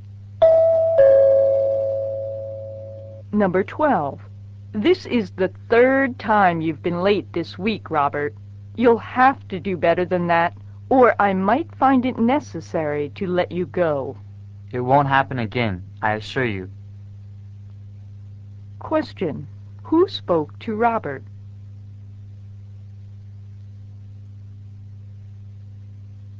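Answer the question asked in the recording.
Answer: His boss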